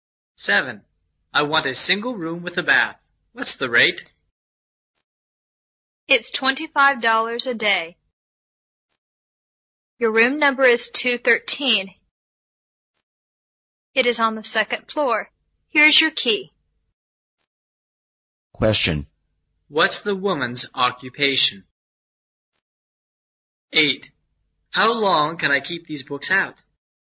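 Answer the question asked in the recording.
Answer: A hotel receptionist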